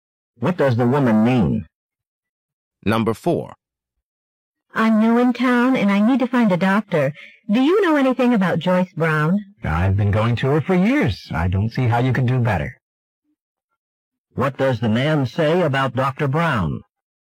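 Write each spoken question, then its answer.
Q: What does the man say about Dr.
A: She is a very good doctor; he recommends her.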